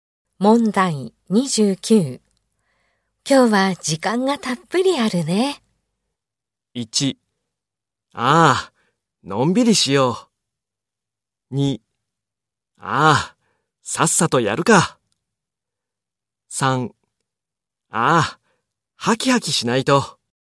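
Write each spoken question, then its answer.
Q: 今日は時間がたっぷりあるね。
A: 1: ああ、のんびりしよう。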